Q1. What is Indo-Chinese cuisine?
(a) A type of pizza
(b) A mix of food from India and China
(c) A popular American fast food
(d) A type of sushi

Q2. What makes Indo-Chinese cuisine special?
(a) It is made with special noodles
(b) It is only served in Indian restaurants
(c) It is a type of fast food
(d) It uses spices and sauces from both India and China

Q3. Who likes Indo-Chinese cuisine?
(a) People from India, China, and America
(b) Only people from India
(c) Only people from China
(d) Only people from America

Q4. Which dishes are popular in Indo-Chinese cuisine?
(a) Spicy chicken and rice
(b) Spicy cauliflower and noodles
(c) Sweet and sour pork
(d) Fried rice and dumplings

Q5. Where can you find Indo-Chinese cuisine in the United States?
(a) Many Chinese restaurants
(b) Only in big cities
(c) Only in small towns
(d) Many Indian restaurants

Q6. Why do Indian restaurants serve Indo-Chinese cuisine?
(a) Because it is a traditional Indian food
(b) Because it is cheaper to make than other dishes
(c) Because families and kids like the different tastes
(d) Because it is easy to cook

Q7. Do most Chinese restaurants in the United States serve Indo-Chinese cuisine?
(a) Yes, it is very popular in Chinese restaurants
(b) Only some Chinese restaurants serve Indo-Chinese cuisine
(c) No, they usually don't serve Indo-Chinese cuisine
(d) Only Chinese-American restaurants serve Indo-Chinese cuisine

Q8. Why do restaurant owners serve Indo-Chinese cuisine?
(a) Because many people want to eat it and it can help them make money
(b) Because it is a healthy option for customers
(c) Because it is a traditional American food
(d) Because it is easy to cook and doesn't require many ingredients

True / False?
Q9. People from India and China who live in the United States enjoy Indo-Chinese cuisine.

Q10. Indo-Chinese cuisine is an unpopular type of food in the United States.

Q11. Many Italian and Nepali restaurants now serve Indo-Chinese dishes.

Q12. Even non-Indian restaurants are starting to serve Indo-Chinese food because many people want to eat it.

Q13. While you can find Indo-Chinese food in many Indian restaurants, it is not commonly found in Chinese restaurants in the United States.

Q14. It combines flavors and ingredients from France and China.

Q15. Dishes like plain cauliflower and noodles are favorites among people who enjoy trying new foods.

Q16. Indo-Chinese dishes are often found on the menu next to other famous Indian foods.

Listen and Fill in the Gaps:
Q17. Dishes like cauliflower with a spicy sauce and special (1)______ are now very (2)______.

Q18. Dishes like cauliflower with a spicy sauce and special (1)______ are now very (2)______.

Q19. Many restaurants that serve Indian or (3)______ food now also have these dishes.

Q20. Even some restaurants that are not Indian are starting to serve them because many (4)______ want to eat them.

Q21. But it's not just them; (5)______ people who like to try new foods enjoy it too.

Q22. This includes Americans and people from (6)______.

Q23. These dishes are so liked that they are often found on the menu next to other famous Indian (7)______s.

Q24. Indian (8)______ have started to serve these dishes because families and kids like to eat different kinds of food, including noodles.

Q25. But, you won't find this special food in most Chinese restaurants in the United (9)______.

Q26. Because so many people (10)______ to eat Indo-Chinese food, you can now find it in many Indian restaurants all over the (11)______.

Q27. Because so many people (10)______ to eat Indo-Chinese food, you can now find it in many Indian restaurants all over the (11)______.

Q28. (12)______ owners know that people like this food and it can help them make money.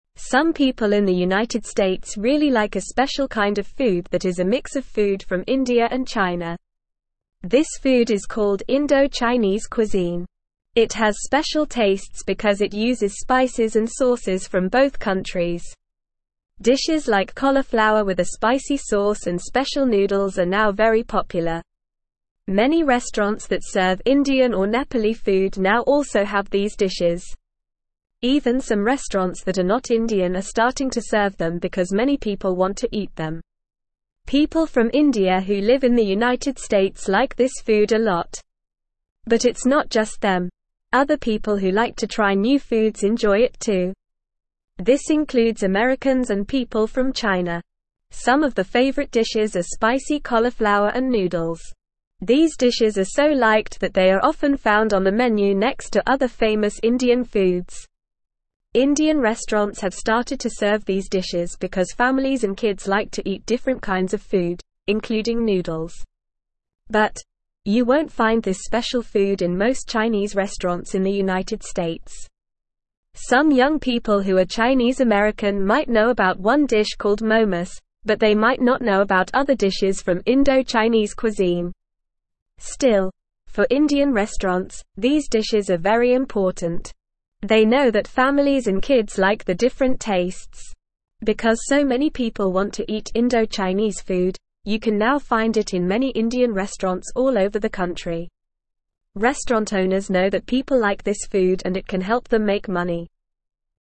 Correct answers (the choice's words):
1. A mix of food from India and China
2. It uses spices and sauces from both India and China
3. People from India, China, and America
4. Spicy cauliflower and noodles
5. Many Indian restaurants
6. Because families and kids like the different tastes
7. No, they usually don't serve Indo-Chinese cuisine
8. Because many people want to eat it and it can help them make money
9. True
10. False
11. False
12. True
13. True
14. False
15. False
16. True
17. noodles
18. popular
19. Nepali
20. people
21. other
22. China
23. food
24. restaurants
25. States
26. want
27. country
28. Restaurant

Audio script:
Some people in the United States really like a special kind of food that is a mix of food from India and China. This food is called Indo-Chinese cuisine. It has special tastes because it uses spices and sauces from both countries. Dishes like cauliflower with a spicy sauce and special noodles are now very popular. Many restaurants that serve Indian or Nepali food now also have these dishes. Even some restaurants that are not Indian are starting to serve them because many people want to eat them.
People from India who live in the United States like this food a lot. But it's not just them; other people who like to try new foods enjoy it too. This includes Americans and people from China. Some of the favorite dishes are spicy cauliflower and noodles. These dishes are so liked that they are often found on the menu next to other famous Indian foods. Indian restaurants have started to serve these dishes because families and kids like to eat different kinds of food, including noodles.
But, you won't find this special food in most Chinese restaurants in the United States. Some young people who are Chinese-American might know about one dish called momos, but they might not know about other dishes from Indo-Chinese cuisine. Still, for Indian restaurants, these dishes are very important. They know that families and kids like the different tastes. Because so many people want to eat Indo-Chinese food, you can now find it in many Indian restaurants all over the country. Restaurant owners know that people like this food and it can help them make money.

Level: Level 2